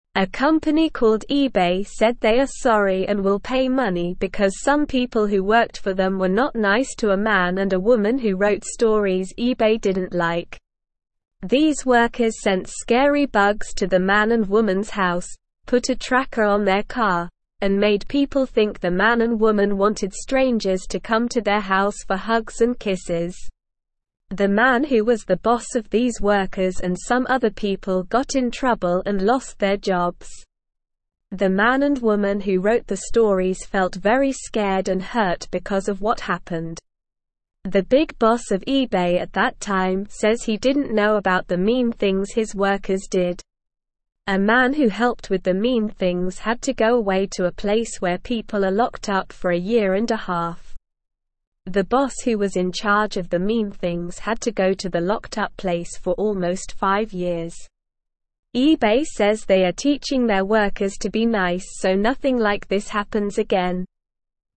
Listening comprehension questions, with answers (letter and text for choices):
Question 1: A company called (1)______ said they are sorry and will pay (2)______ because some people who worked for them were not nice to a man and a woman who wrote stories eBay didn't like.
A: money

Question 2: These workers sent scary bugs to the man and woman's house, put a tracker on their car, and made (3)______ think the man and woman wanted strangers to come to their house for hugs and kisses.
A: people

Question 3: The man who was the boss of these workers and some other people got in trouble and (4)______ their jobs.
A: lost

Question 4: The big boss of eBay at that (5)______ says he didn't know about the mean things his workers did.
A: time

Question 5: A man who helped with the mean things had to go away to a (6)______ where people are locked up for a year and a (7)______.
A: place

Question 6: A man who helped with the mean things had to go away to a (6)______ where people are locked up for a year and a (7)______.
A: half

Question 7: eBay (8)______ they are teaching their workers to be nice so nothing like this happens again.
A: says

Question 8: Why is eBay sorry?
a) Some workers were mean to a man and a woman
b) They lost a lot of money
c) They didn't sell enough things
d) They didn't like the stories the man and woman wrote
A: a) Some workers were mean to a man and a woman

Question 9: What did the mean workers do to the man and woman?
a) Sent scary bugs to their house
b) Sent them nice presents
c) Gave them lots of money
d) Helped them write their stories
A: a) Sent scary bugs to their house

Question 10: What did the mean workers put on the man and woman's car?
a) A big sticker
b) A tracker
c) A new engine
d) A picture of their faces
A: b) A tracker

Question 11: What did the mean workers make people think the man and woman wanted?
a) Strangers to come to their house for dinner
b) Strangers to come to their house to play games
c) Strangers to come to their house to watch TV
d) Strangers to come to their house for hugs and kisses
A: d) Strangers to come to their house for hugs and kisses

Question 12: What happened to the boss of the mean workers?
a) He got a promotion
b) He won a big prize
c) He got in trouble and lost his job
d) He retired and went on vacation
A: c) He got in trouble and lost his job

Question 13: How did the man and woman feel because of what happened?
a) Happy and excited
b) Scared and hurt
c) Angry and bored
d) Tired and hungry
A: b) Scared and hurt

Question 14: What did the big boss of eBay say?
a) He was very happy about what his workers did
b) He wanted to do mean things too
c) He was going to quit his job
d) He didn't know about the mean things his workers did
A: d) He didn't know about the mean things his workers did

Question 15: How long did the boss who was in charge of the mean things have to go to the locked-up place?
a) One month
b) Two days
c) Almost five years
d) Forever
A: c) Almost five years

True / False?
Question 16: A man who helped with the mean things received an award and recognition for a year and a half.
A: False

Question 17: The boss of these workers and some other people got promoted and gained new opportunities.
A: False

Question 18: The workers sent scary bugs to the man and woman's house and put a tracker on their car.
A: True

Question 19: The man and woman who wrote the stories felt very excited and thrilled because of what happened.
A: False

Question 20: The big boss of eBay at that time says he didn't know about the mean things his workers did.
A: True

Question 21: The boss who was in charge of the mean things received a promotion and a raise for almost five years.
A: False

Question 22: eBay is a company that said sorry and will give money because some people who worked for them were not nice to a man and a woman.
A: True

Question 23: Why is eBay saying sorry?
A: eBay is saying sorry because some of their workers were mean to a man and a woman.

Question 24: How did the man and woman feel after what happened?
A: The man and woman felt very scared and hurt after what happened.

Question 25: Did the big boss of eBay know about the mean things the workers did?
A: No, the big boss of eBay says he didn't know about the mean things the workers did.

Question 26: Where did the man who helped with the mean things go?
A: The man who helped with the mean things had to go to a place where people are locked up for a year and a half.

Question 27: How long did the boss who was in charge of the mean things go to the locked-up place for?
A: The boss who was in charge of the mean things went to the locked-up place for almost five years.

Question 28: What is eBay doing to make sure this doesn't happen again?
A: eBay is teaching their workers to be nice so that nothing like this happens again.

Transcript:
A company called eBay said they are sorry and will pay money because some people who worked for them were not nice to a man and a woman who wrote stories eBay didn't like. These workers sent scary bugs to the man and woman's house, put a tracker on their car, and made people think the man and woman wanted strangers to come to their house for hugs and kisses. The man who was the boss of these workers and some other people got in trouble and lost their jobs.
The man and woman who wrote the stories felt very scared and hurt because of what happened. A man who helped with the mean things had to go away to a place where people are locked up for a year and a half. The boss who was in charge of the mean things had to go to the locked-up place for almost five years. eBay says they are teaching their workers to be nice so nothing like this happens again.

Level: Level 1